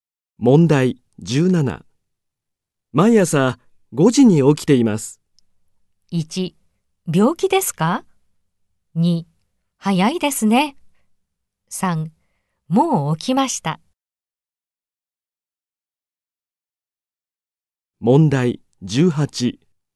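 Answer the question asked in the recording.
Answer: 2: 早いですね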